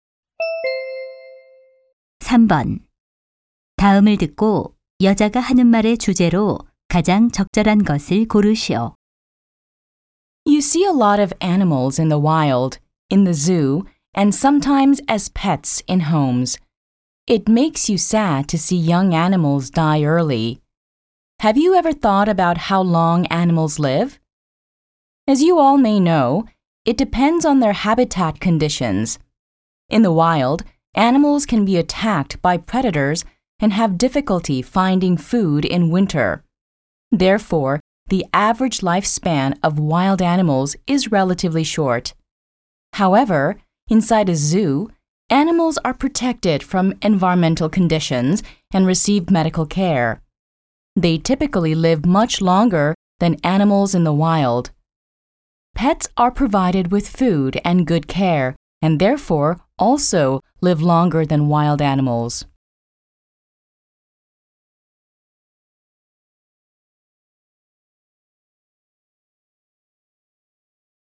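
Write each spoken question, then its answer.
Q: 다음을 듣고 여자가 하는 말의 주제로 가장 적절한 것을 고르시오.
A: 서식 환경에 따른 동물의 수명 차이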